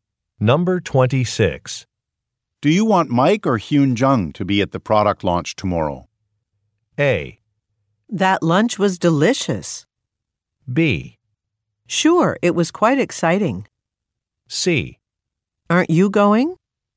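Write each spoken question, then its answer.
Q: Do you want Mike or Hyun Jung to be at the product launch tomorrow?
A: C: Aren't you going?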